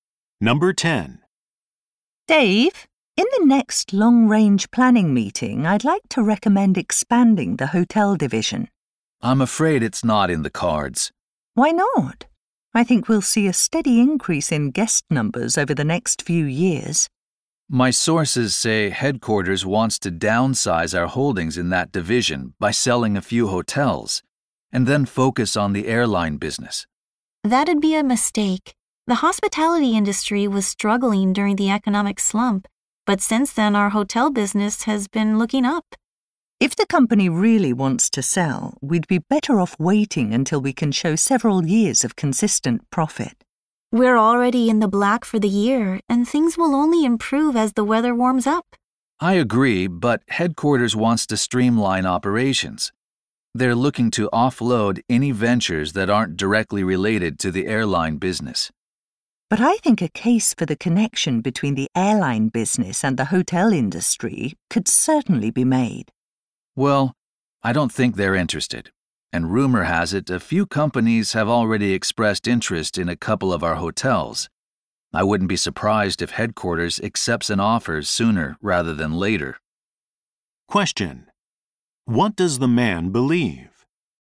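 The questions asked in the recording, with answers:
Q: What does the man believe?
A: Headquarters will soon sell some of the hotels.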